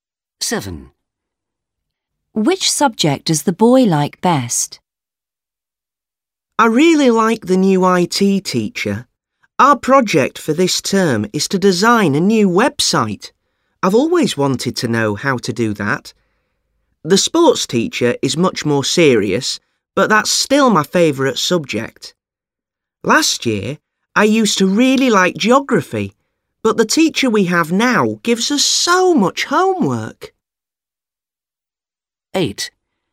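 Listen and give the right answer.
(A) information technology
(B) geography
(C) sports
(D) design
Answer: (C) sports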